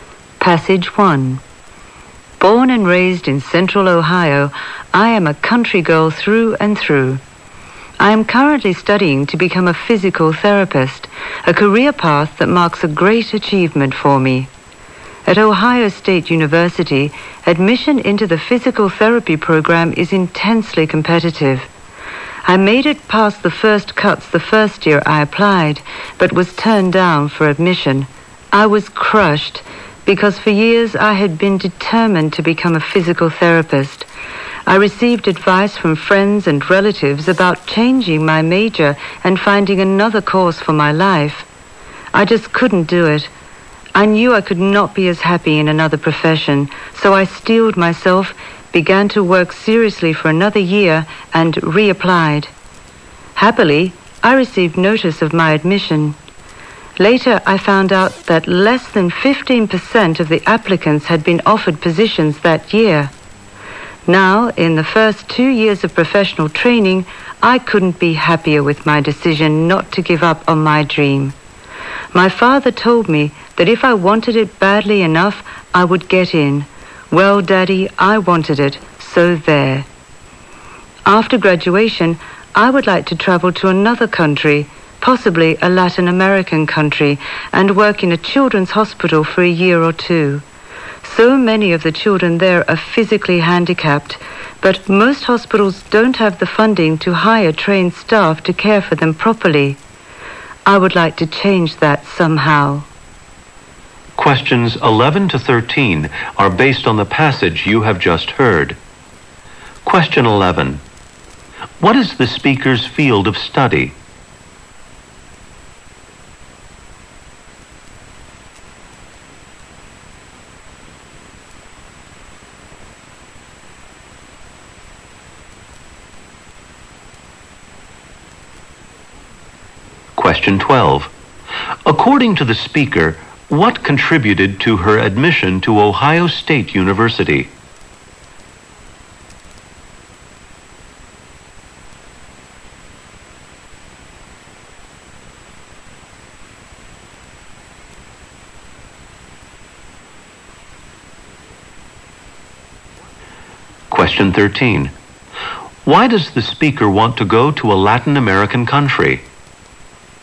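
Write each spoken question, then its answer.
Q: What is the speaker's field of study?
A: Physical therapy.

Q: According to the speaker, what contributed to her admission to Ohio State University?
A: Her determination and persistence in reapplying.

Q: Why does the speaker want to go to a Latin American country?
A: To help care for physically handicapped children in a hospital.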